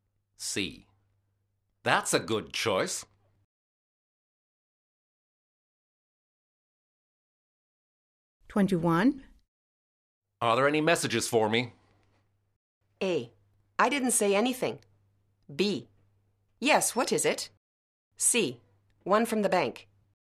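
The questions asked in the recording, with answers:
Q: Are there any messages for me?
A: C: One from the bank.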